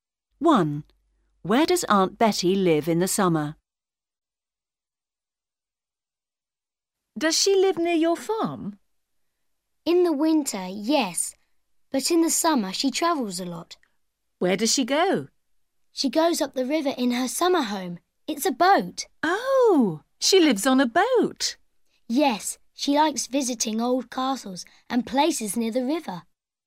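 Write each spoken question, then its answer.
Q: Where does Aunt Betty live in the summer?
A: On a boat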